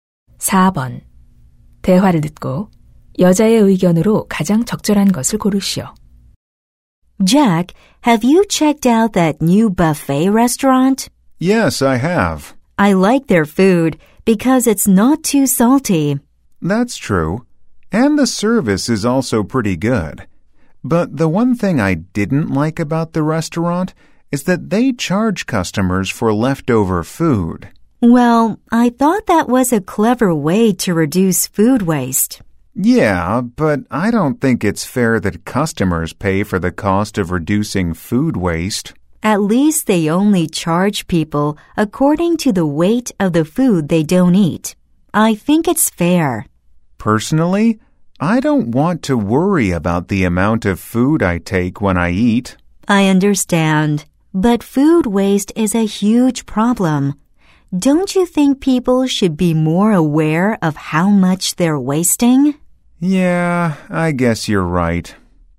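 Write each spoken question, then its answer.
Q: 대화를 듣고 여자의 의견으로 가장 적절한 것을 고르시오.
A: 남은 음식에 요금을 부과하는 것은 음식물 쓰레기를 줄이는 공정한 방법이다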